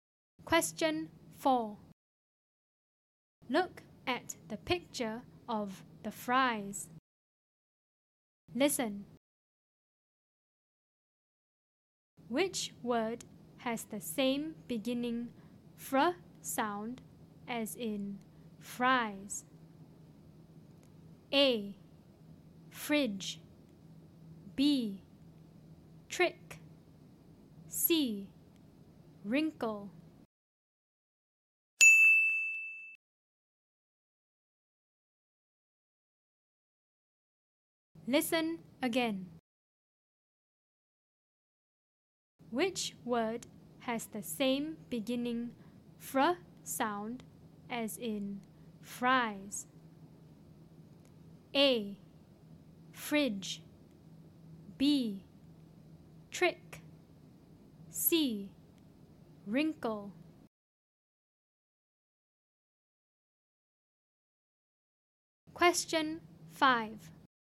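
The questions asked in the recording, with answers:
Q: Which word has the same beginning fr sound as in fries?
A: A: Fridge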